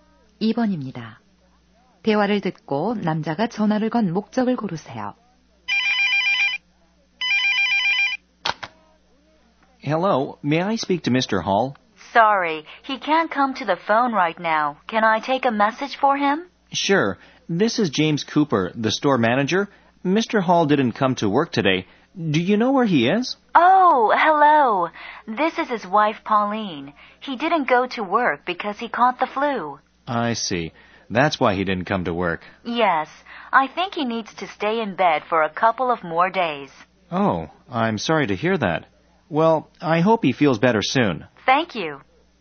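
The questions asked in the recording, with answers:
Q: 대화를 듣고 남자가 전화를 건 목적을 고르세요.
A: 출근하지 않은 Mr. Hall의 행방을 알아보려고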